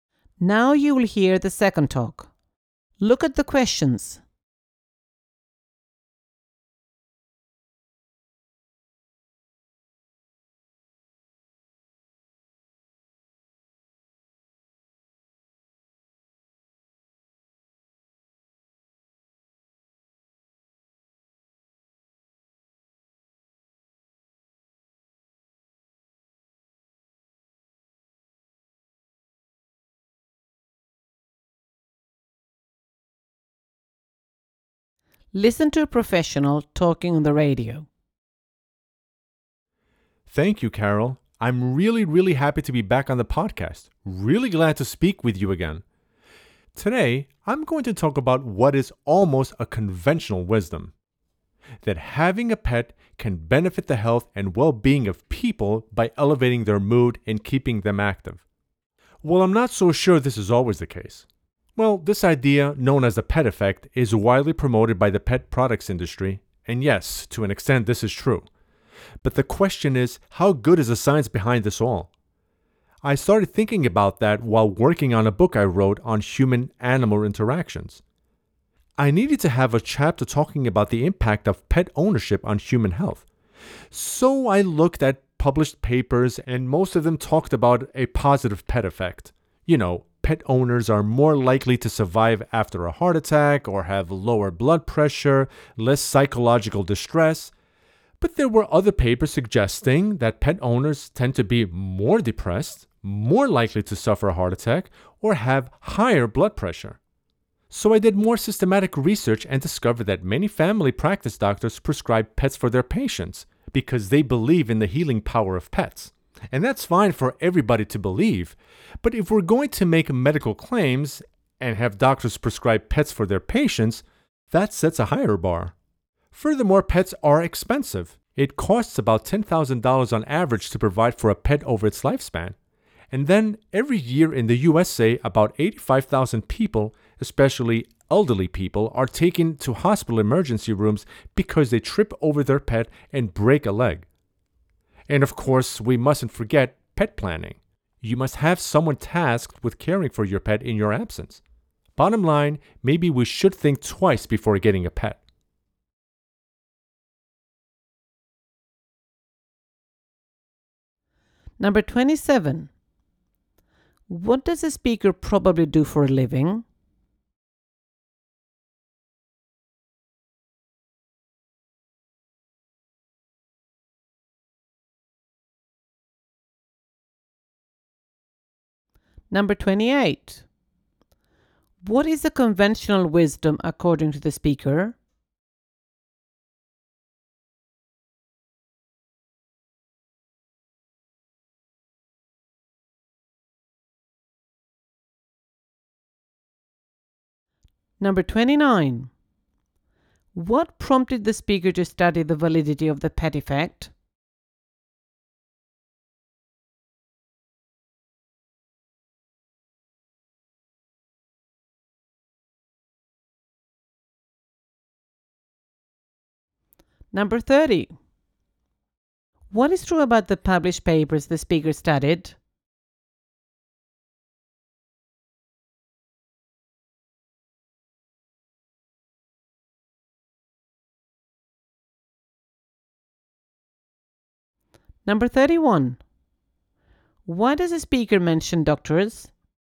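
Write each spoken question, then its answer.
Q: What is the conventional wisdom according to the speaker?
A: Having a pet benefits people's health and well-being by lifting their mood and keeping them active

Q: What prompted the speaker to study the validity of the pet effect?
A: Writing a book chapter on how owning a pet affects human health

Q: What is true about the published papers the speaker studied?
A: Most reported a positive pet effect, but some reported negative effects

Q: Why does the speaker mention doctors?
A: Doctors prescribe pets, which sets a higher bar for medical claims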